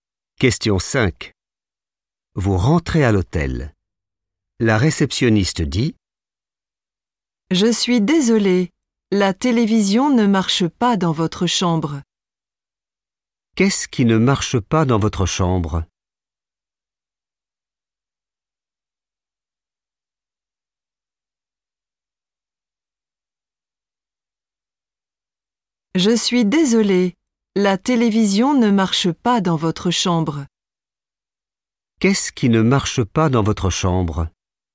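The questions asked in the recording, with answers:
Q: Qu'est-ce qui ne marche pas dans votre chambre?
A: la télévision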